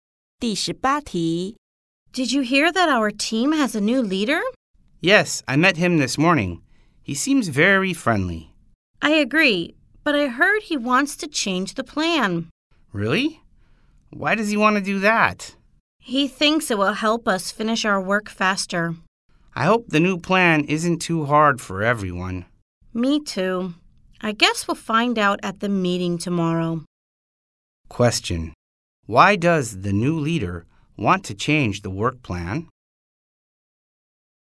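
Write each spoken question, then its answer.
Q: Why does the new leader want to change the work plan?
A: He thinks it will help them finish their work faster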